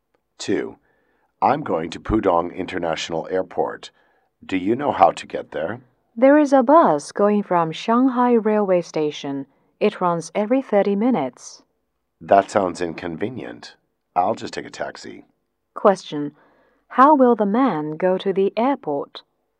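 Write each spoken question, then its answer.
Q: how will the man go to the airport?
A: By taxi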